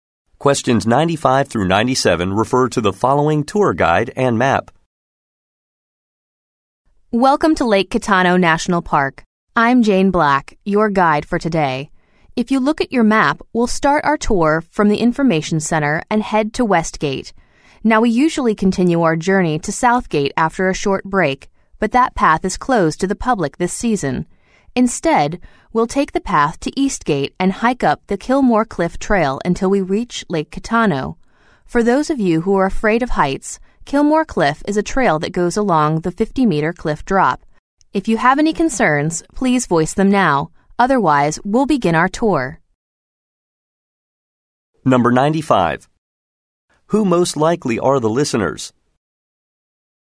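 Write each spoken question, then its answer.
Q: Who most likely are the listeners?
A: Tourists on a park tour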